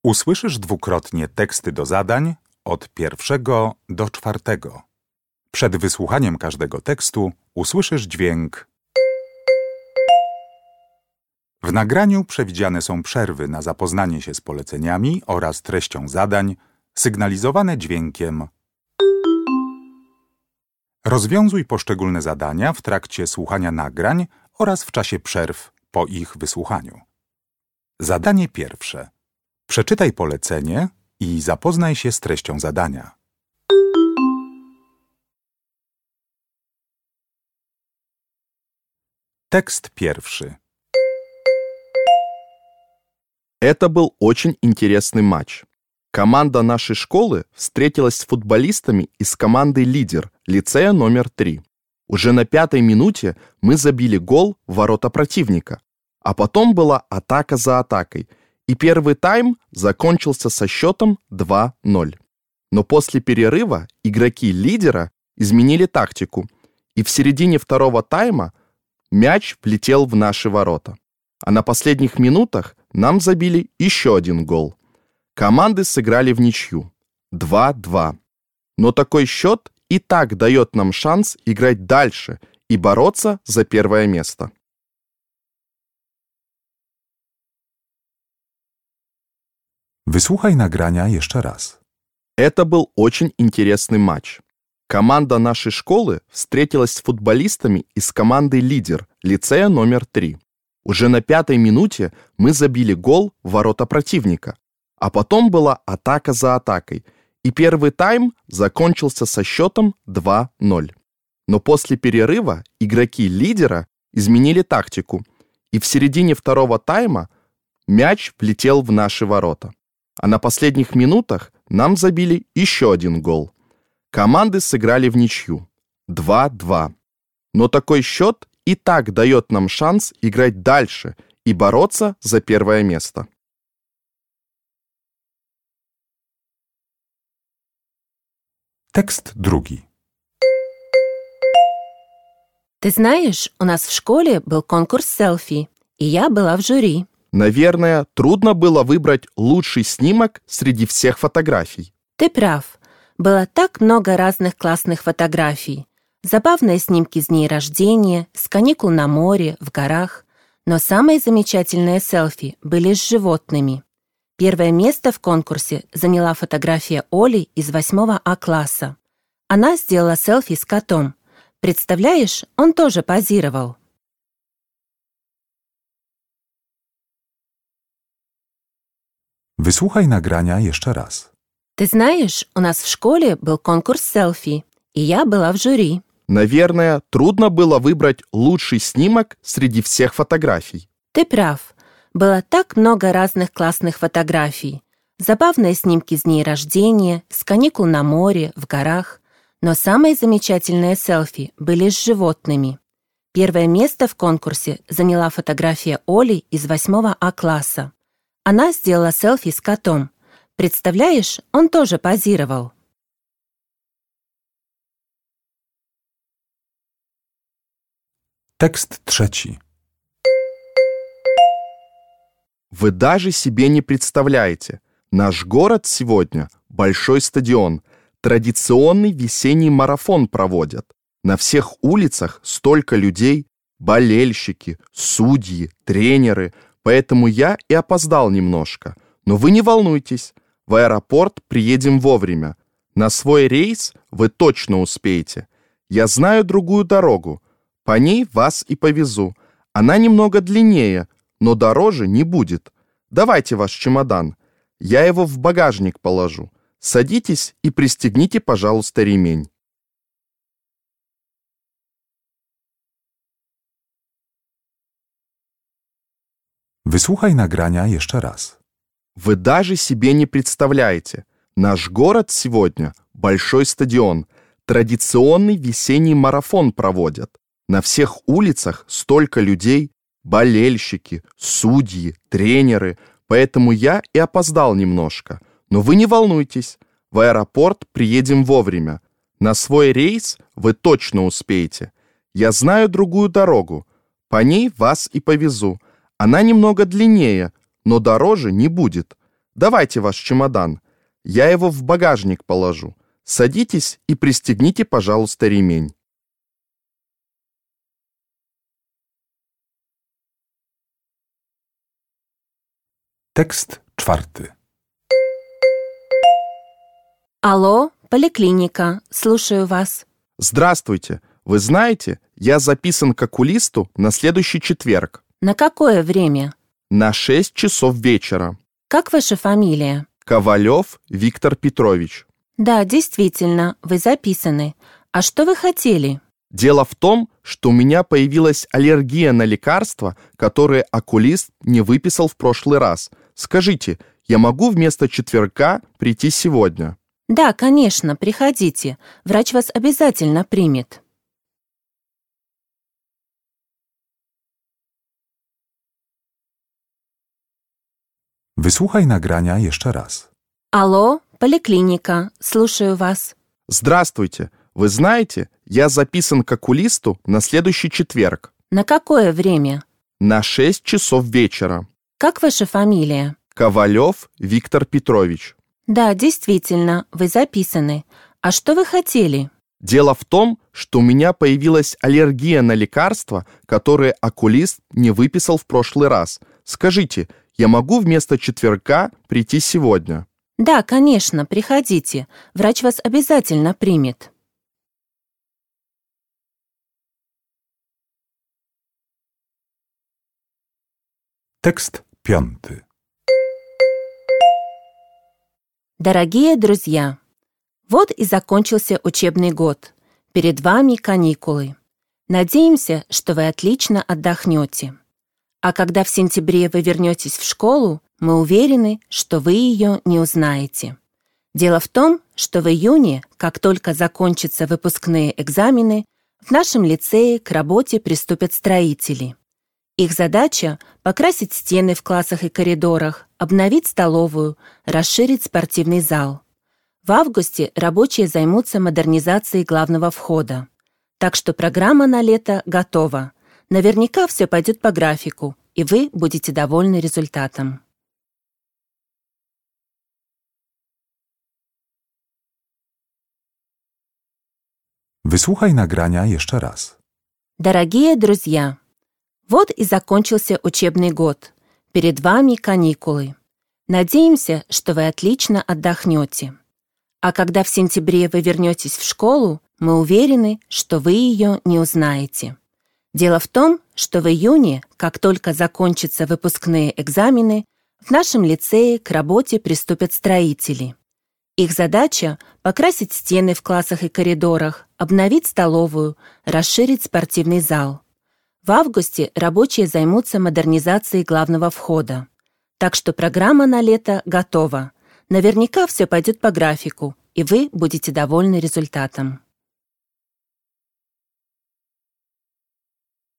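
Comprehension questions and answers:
Uruchamiając odtwarzacz z oryginalnym nagraniem CKE usłyszysz dwukrotnie pięć tekstów. W zadaniach 1.1.–1.5., na podstawie informacji zawartych w nagraniu, z podanych odpowiedzi wybierz właściwą.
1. С каким результатом закончился футбольный матч?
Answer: Вничью, 2:2

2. Кто это говорит?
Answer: Таксист

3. Мужчина звонит в поликлинику, чтобы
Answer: прийти к окулисту сегодня вместо четверга

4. Этот текст о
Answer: ремонте в лицее летом

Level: egzamin ósmoklasisty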